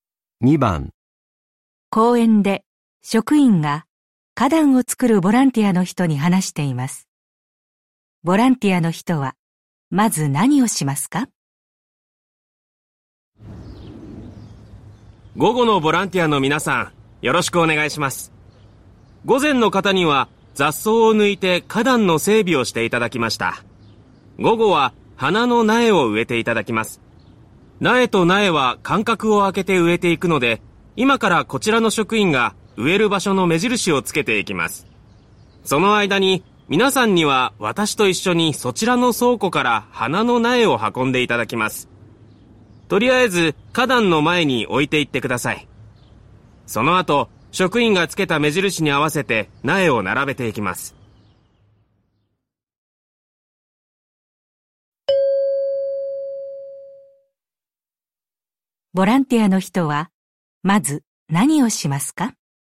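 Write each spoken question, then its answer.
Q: ボランティアの人はまず何をしますか?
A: 倉庫から花の苗を運ぶ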